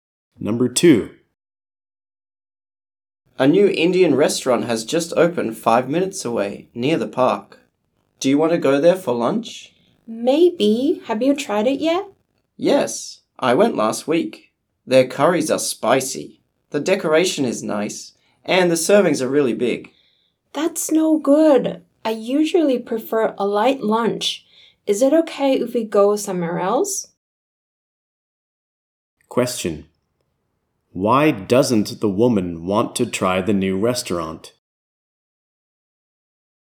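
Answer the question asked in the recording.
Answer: She prefers a light lunch, and the servings there are big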